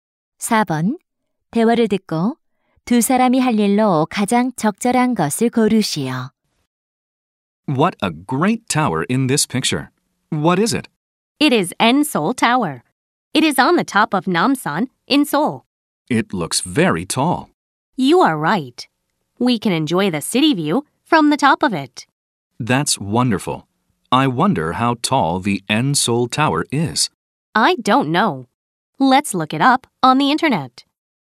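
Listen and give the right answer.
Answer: 인터넷에서 타워 높이 찾아보기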